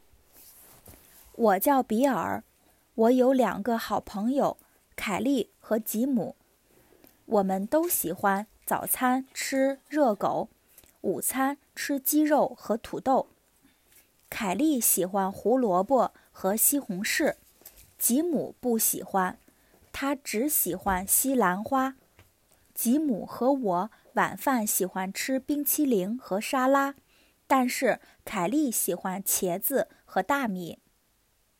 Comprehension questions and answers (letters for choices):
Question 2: 吉姆喜欢什么蔬菜?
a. 他喜欢吃西兰花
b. 他喜欢吃胡萝卜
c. 他喜欢吃比萨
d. 他喜欢吃茄子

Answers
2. a

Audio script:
我有两个好朋友,凯利和吉姆。 我们都喜欢早餐吃热狗,午餐吃鸡肉和土豆。 凯利喜欢胡萝卜和西红柿。吉姆不喜欢。他只喜欢西兰花。 吉姆和我晩饭喜欢吃冰淇淋和沙拉。但是凯利喜欢茄子和大米。

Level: beginner's